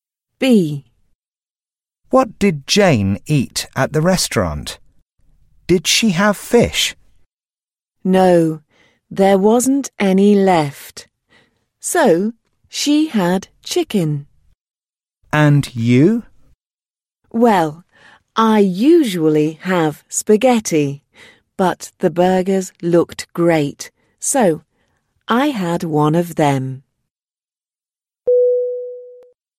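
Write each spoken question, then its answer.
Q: What did Jane eat at the restaurant?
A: chicken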